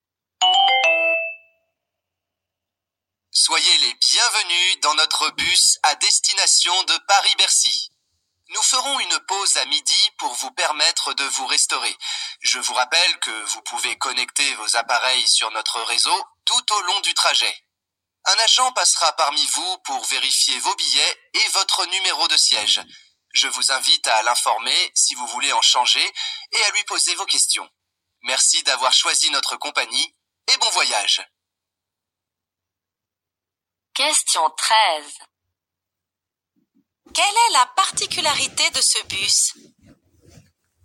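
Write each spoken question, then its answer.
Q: Quelle est la particularité de ce bus?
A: On peut se connecter au réseau (internet) pendant le trajet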